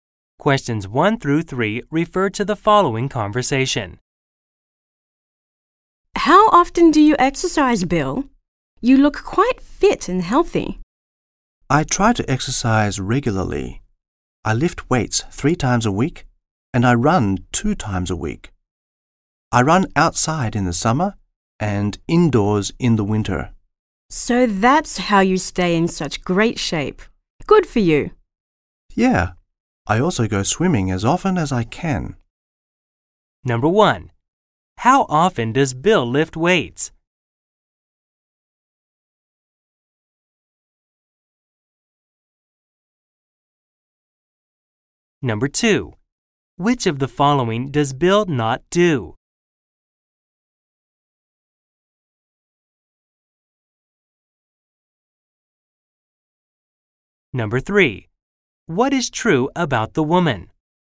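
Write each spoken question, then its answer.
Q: How often does Bill lift weights?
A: Three times a week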